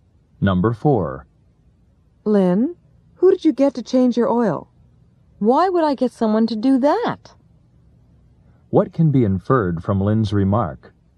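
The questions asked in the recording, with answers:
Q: What can be inferred from Lynn's remark?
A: Lynn changed her oil herself.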